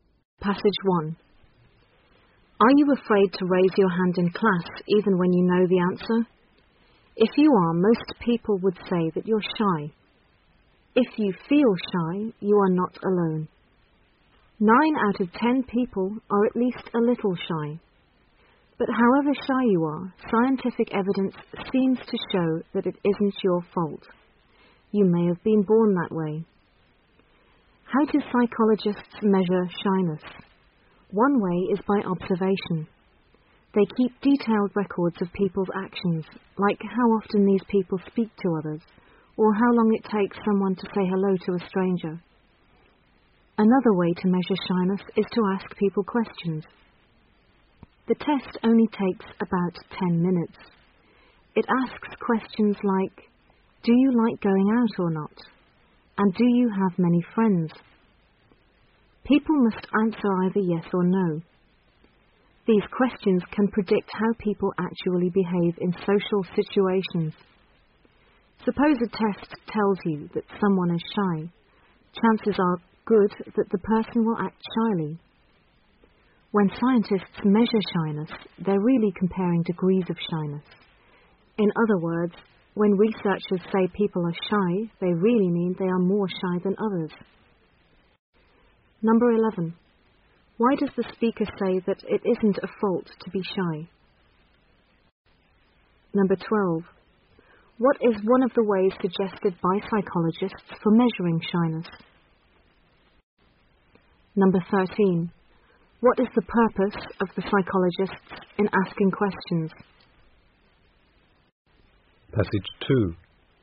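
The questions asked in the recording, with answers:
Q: Why does the speaker say that it isn't a fault to be shy?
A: Because people may be born shy

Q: What is one of the ways suggested by psychologists for measuring shyness?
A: Observation (or asking questions)

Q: What is the purpose of the psychologists in asking questions?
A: To predict how people behave in social situations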